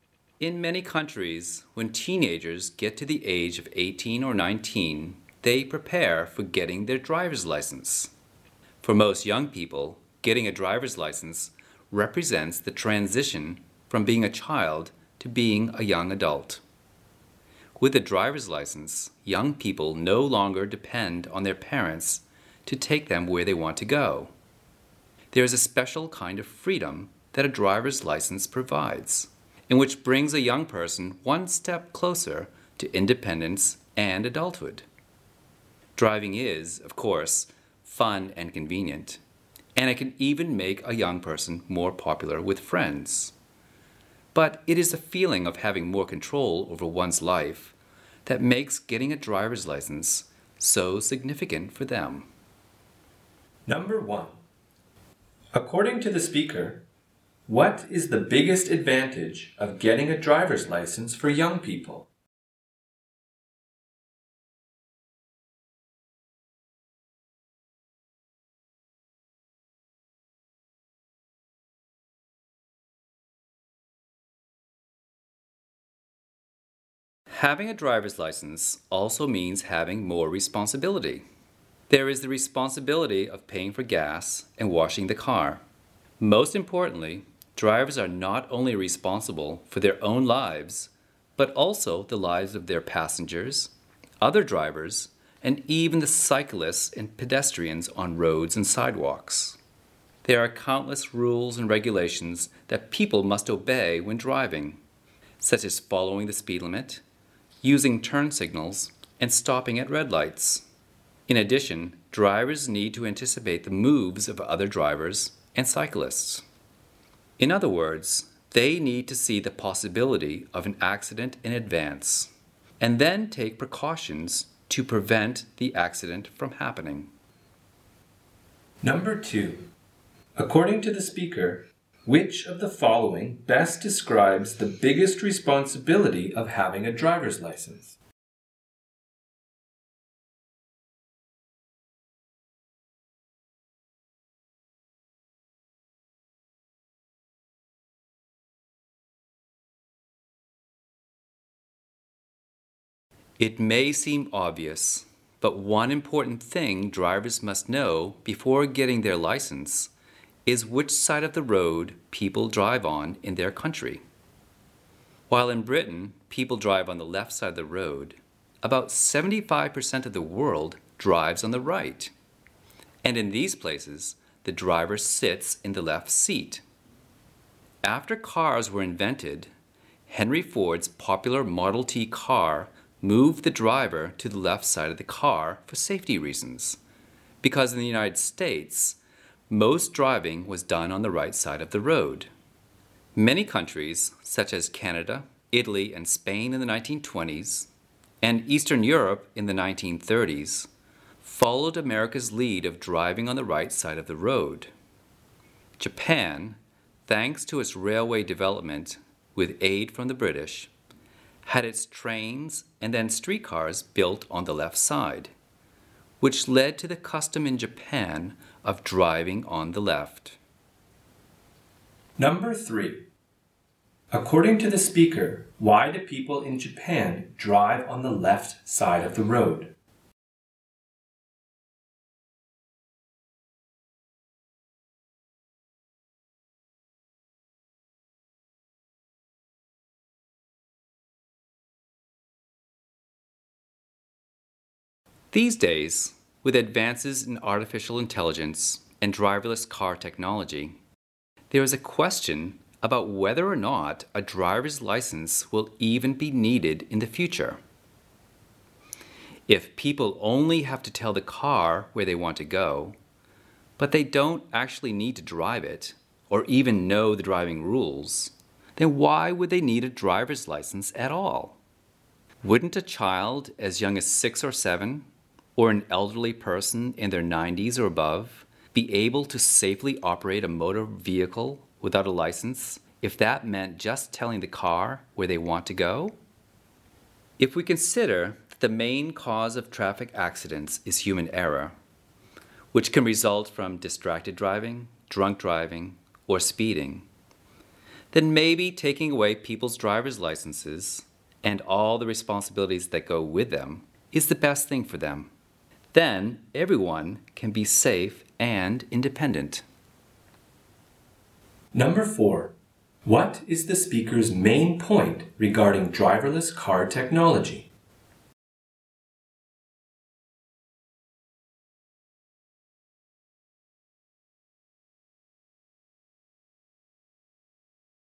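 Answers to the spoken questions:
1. The feeling of having more control over their lives (independence)
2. Being responsible for the lives of passengers, other drivers, cyclists and pedestrians
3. Because its British-aided railways had trains and streetcars built on the left side
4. Driver's licenses may no longer be needed, and removing human drivers could make everyone safe and independent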